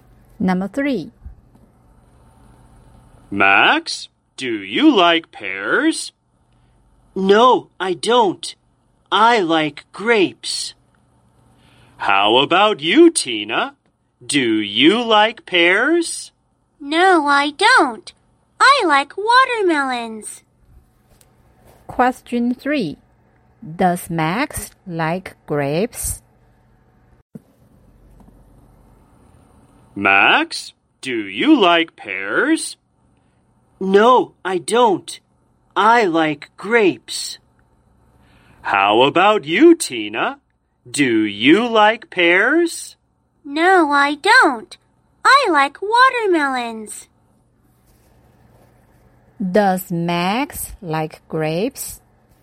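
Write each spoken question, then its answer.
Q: Does Max like grapes?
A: Yes, he does.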